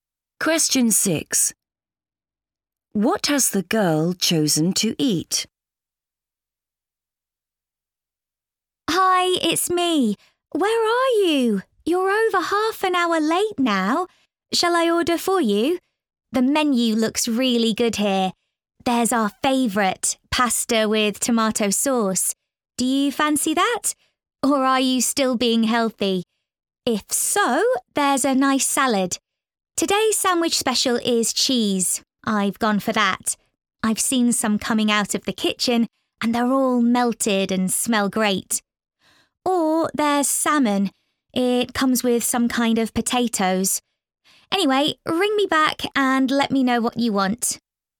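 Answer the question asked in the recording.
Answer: The cheese sandwich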